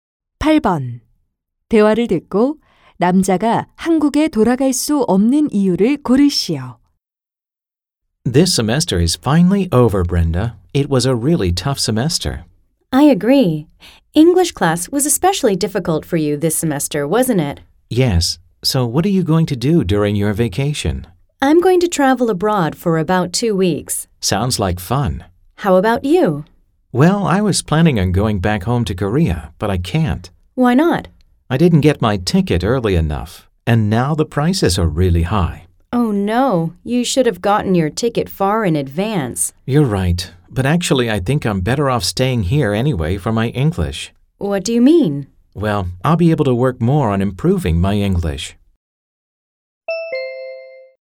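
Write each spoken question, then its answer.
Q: 대화를 듣고 남자가 한국에 돌아갈 수 없는 이유를 고르시오.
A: 항공권을 늦게 사서 가격이 너무 비싸서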